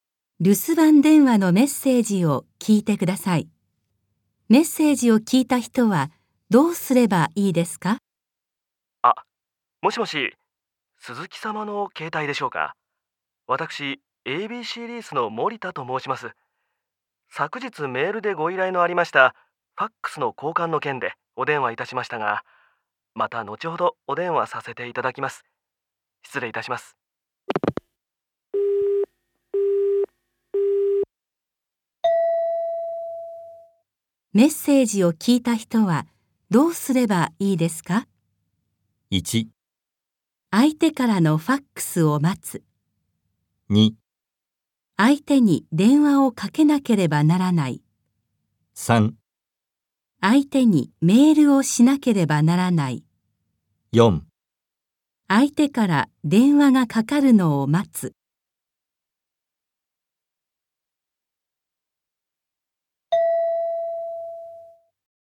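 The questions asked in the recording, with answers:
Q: メッセージを聞いた人はどうすればいいですか?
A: 4: 相手から電話がかかるのを待つ。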